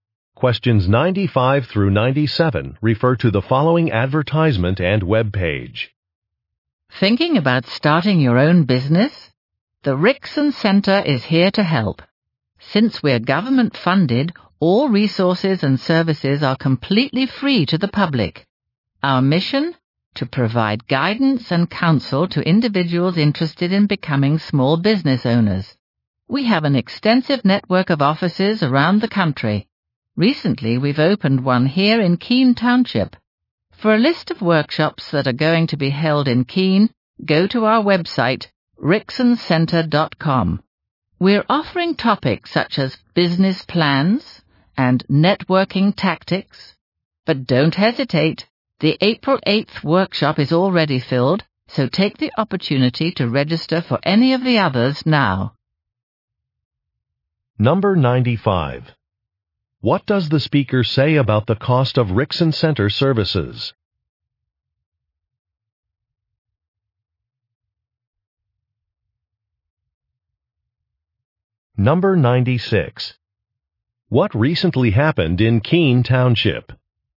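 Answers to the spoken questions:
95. They are free
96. A Rickson Center office opened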